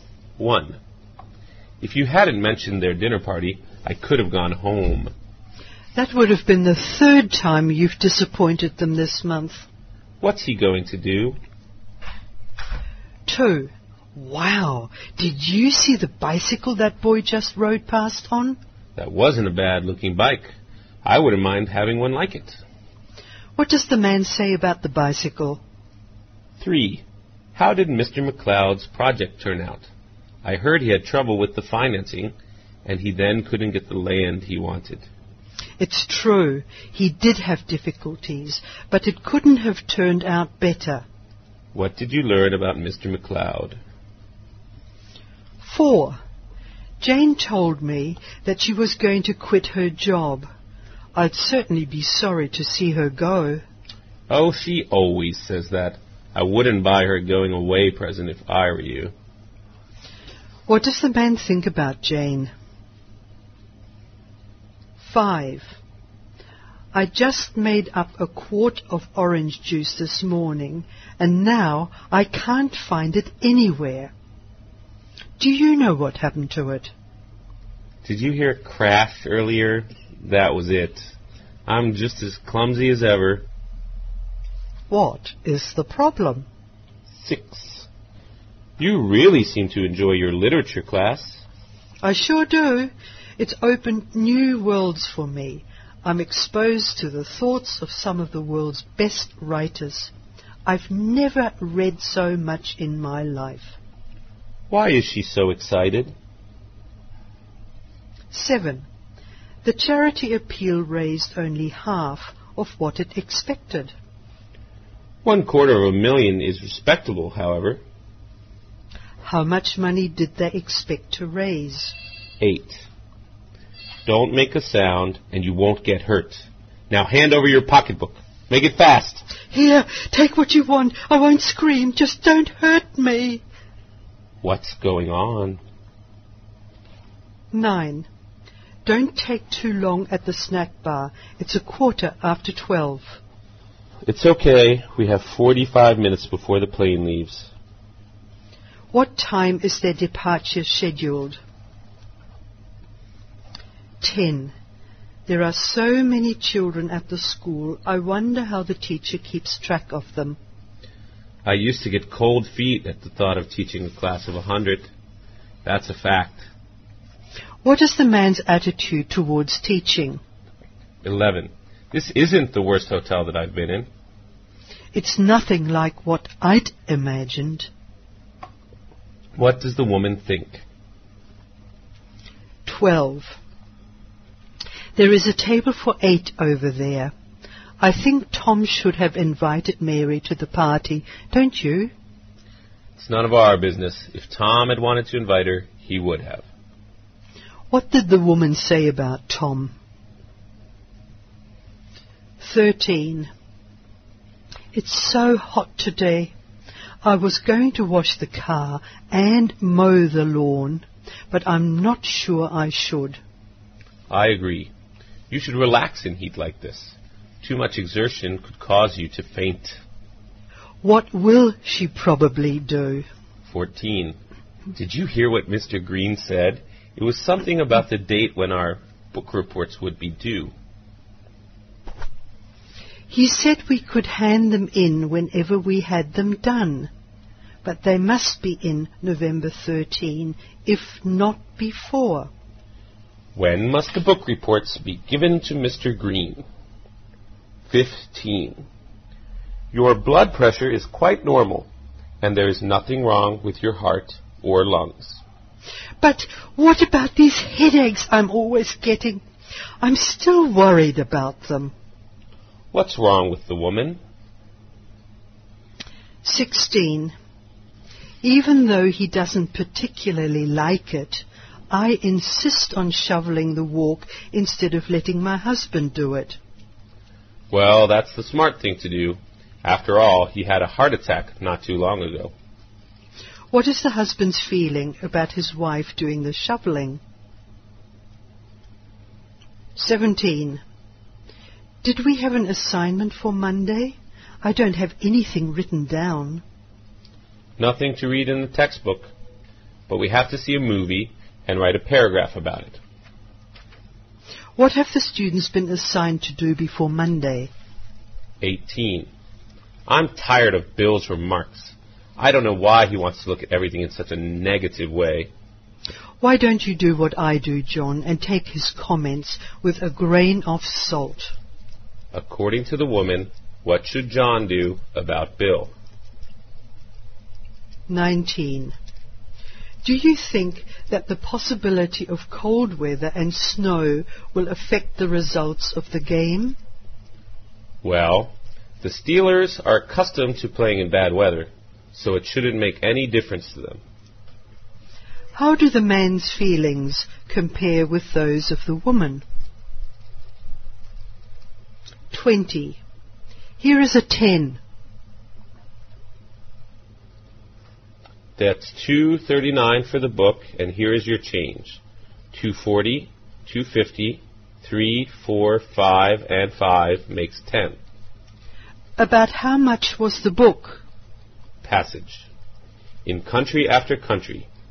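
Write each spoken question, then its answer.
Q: What does the man say about the bicycle?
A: He'd like to have one like it.

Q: What did you learn about Mr. McLeod?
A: His project turned out very well despite difficulties.

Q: What does the man think about Jane?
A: She won't really quit her job.

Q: What is the problem?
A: The woman dropped and spilled the orange juice.

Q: Why is she so excited?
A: Her literature class exposes her to great writers' thoughts.

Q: How much money did they expect to raise?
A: $500,000

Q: What's going on?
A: A robbery.

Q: What time is their departure scheduled?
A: 1:00

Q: What did the woman say about Tom?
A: It was Tom's decision whether to invite Mary.

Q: What will she probably do?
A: Relax instead of working.

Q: What's wrong with the woman?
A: She keeps getting headaches.

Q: What is the husband's feeling about his wife doing the shoveling?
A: He doesn't like it.

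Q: What have the students been assigned to do before Monday?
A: See a movie and write a paragraph about it.

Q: According to the woman, what should John do about Bill?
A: Not take his comments too seriously.

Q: About how much was the book?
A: $2.39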